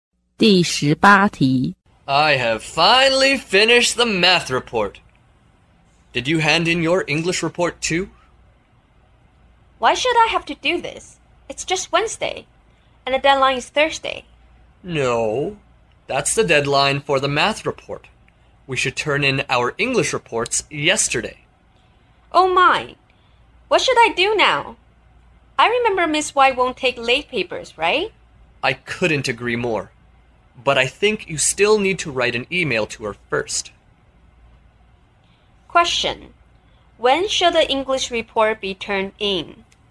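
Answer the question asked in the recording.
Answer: Tuesday (yesterday)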